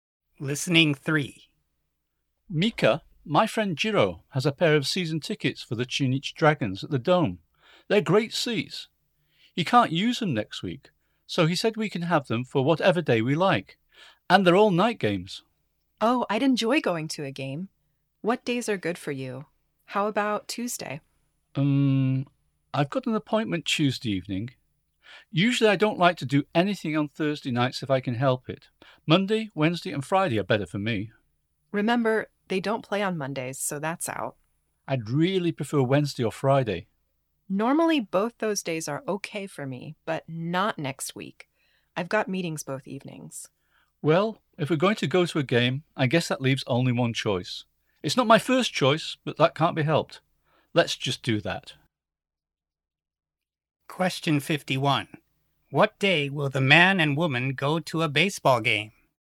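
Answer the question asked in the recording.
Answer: Thursday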